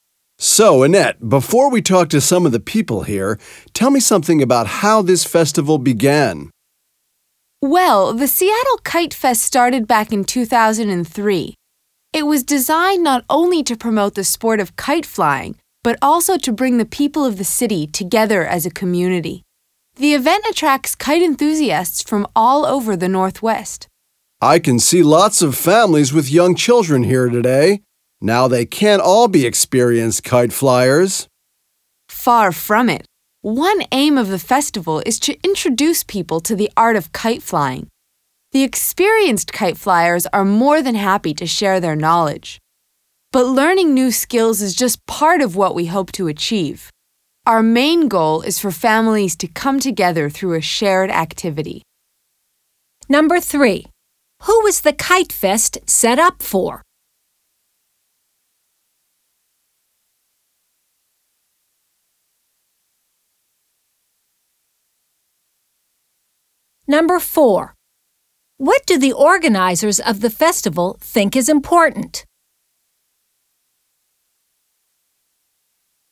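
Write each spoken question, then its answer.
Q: What do the organizers of the festival think is important?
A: Families coming together through a shared activity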